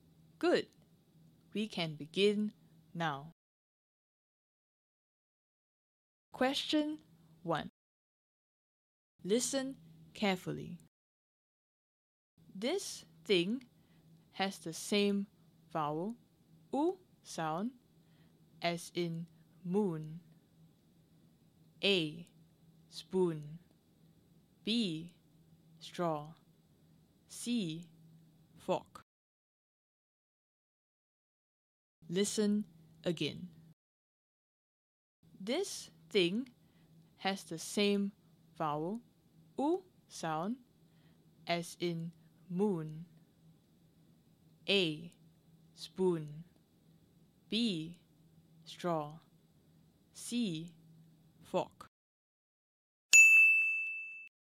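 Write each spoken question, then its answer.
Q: This thing has the same vowel, U sound, as in moon.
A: A: spoon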